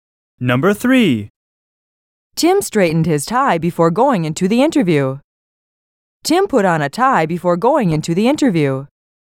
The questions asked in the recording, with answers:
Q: Tim put on a tie before going into the interview.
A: Different is the correct answer.